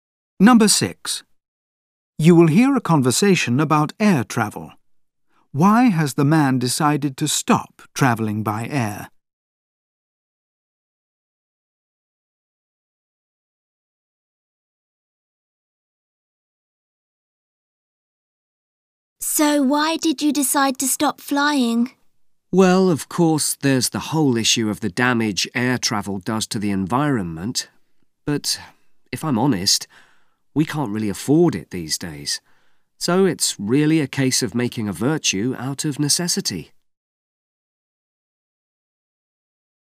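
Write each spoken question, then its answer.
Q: Why has the man decided to stop travelling by air?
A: He can't afford it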